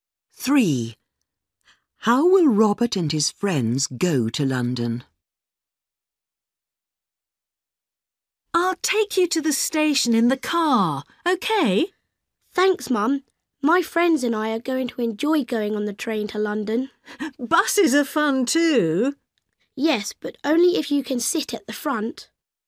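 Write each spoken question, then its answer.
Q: How will Robert and his friends go to London?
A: By train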